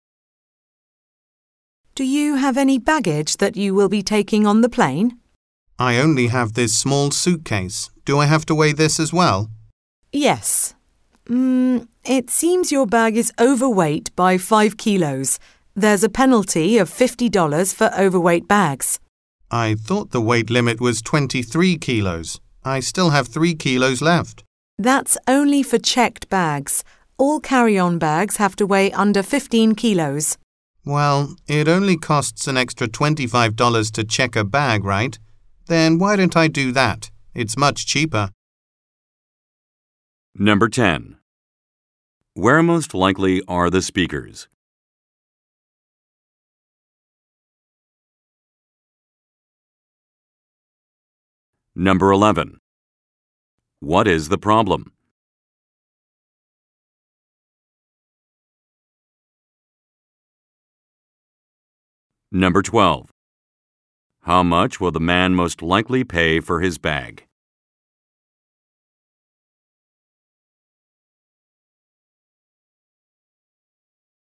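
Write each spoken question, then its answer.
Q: Where most likely are the speakers?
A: At an airport check-in counter

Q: What is the problem?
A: The carry-on bag is overweight

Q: How much will the man most likely pay for his bag?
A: $25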